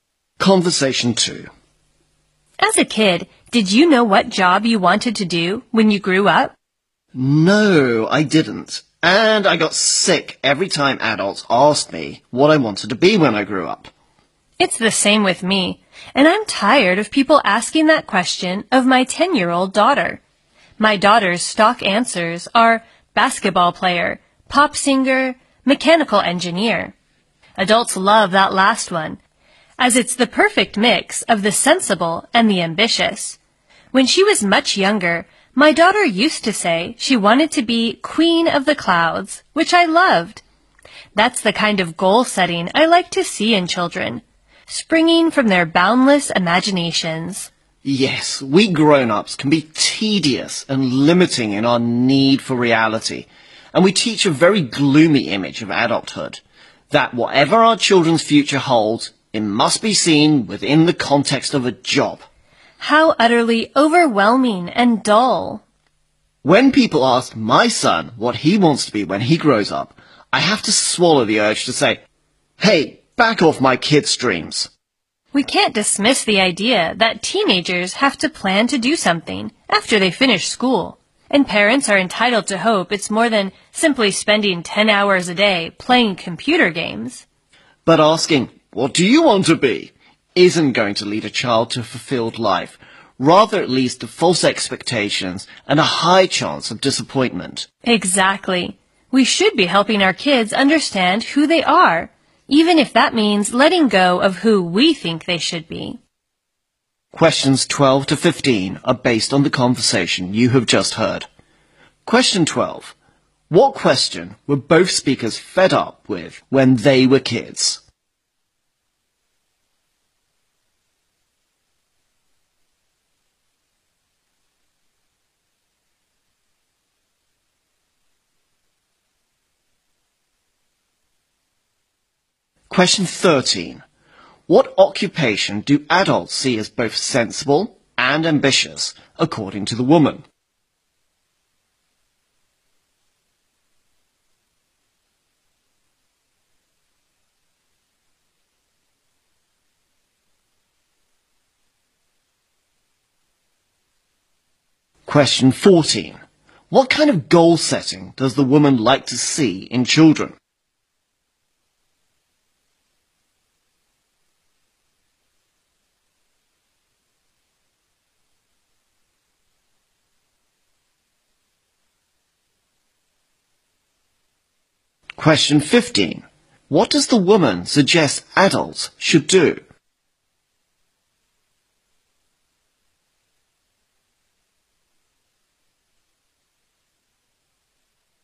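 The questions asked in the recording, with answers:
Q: What question were both speakers fed up with when they were kids?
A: What they wanted to be when they grew up.

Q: What occupation do adults see as both sensible and ambitious, according to the woman?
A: Mechanical engineer.

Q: What kind of goal setting does the woman like to see in children?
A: Goals springing from their boundless imaginations.

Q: What does the woman suggest adults should do?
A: Help kids understand who they are.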